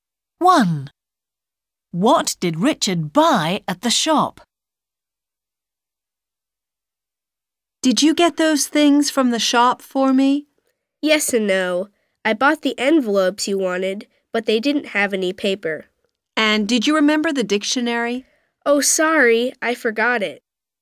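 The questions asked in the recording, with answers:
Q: What did Richard buy at the shop?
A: envelopes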